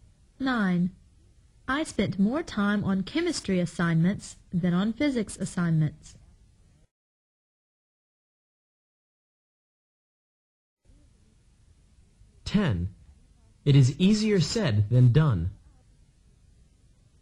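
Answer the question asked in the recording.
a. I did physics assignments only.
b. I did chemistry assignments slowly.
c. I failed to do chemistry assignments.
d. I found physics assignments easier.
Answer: d. I found physics assignments easier.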